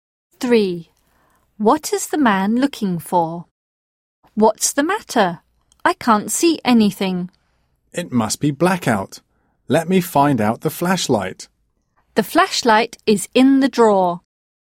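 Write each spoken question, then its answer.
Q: What is the man looking for?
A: The flashlight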